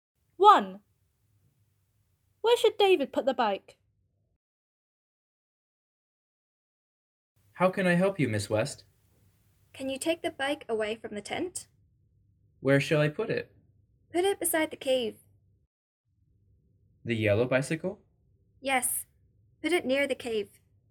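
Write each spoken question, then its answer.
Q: Where should David put the bike?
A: Beside the cave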